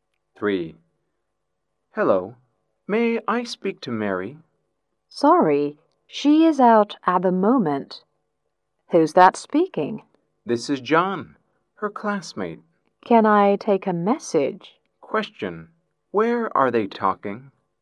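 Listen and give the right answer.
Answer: On the phone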